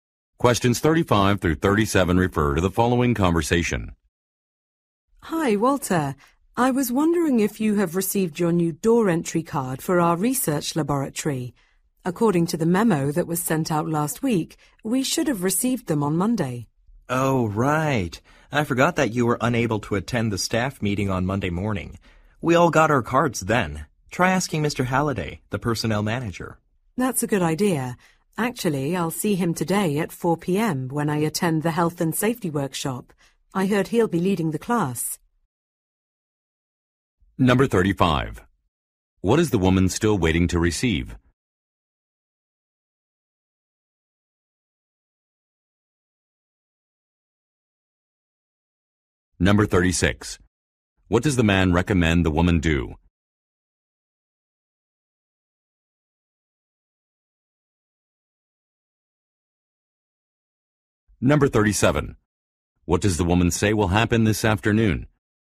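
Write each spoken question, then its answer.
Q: What is the woman still waiting to receive?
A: A new door entry card

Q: What does the man recommend the woman do?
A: Ask Mr. Halliday, the personnel manager

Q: What does the woman say will happen this afternoon?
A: She will attend a health and safety workshop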